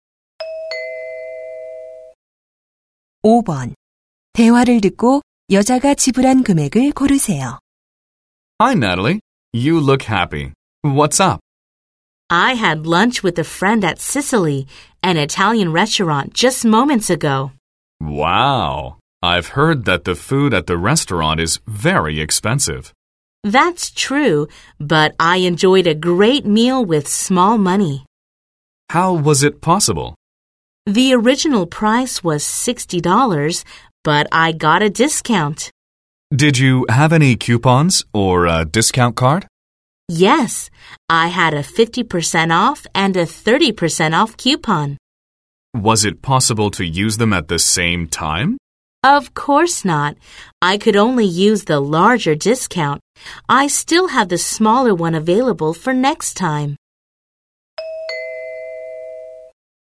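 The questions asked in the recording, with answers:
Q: 대화를 듣고 여자가 지불한 금액을 고르세요.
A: 30달러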